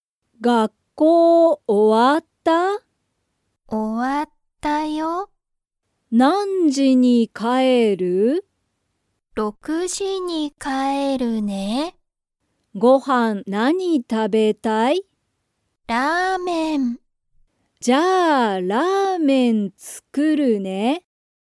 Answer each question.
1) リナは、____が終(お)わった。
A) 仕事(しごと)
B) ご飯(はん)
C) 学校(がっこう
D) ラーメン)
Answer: C

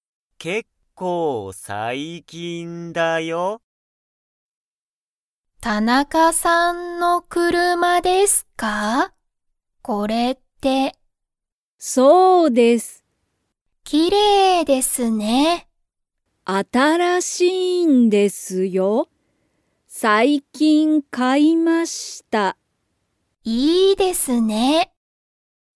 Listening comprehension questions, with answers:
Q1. その車(くるま)は、田中(たなか)さんの車(くるま)ですか?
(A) はい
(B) いいえ)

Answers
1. A

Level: Level 1

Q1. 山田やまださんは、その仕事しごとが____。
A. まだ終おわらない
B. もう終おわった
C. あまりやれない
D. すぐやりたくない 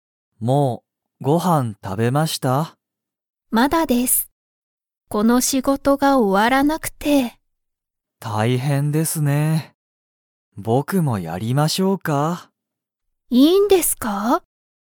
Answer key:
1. A

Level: Level 1

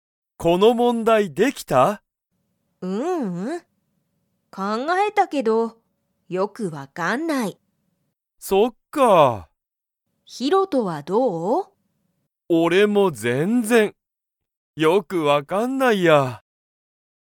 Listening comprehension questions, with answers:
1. ユウコは、その問題もんだいができましたか?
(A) はい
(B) いいえ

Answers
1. B

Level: Level 1

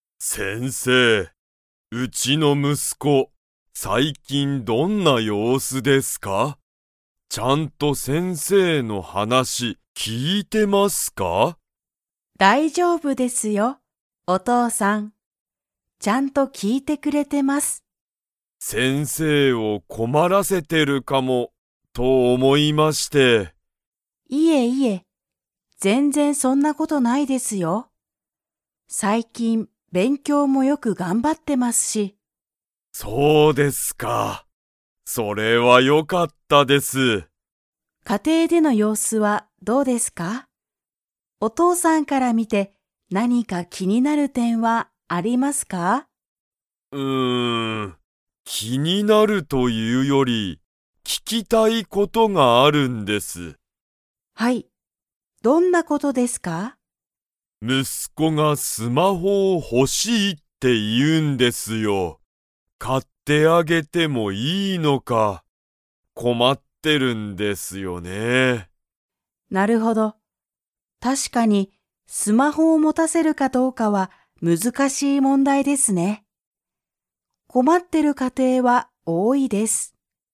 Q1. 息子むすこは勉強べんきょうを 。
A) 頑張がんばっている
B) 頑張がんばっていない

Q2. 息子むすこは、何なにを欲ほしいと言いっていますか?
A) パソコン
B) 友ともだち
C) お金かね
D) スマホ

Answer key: 1A, 2D

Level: Level 3

